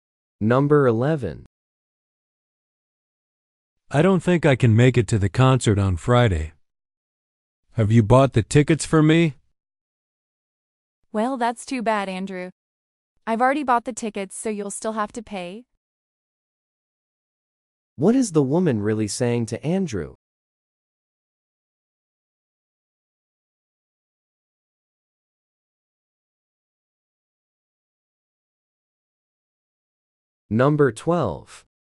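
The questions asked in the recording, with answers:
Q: What is the woman really saying to Andrew?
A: He still has to pay for the ticket.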